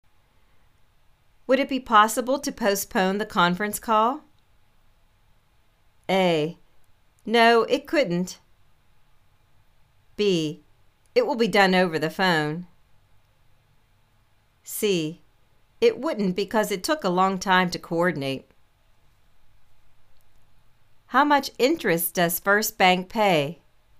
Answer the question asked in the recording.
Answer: It wouldn't, because it took a long time to coordinate.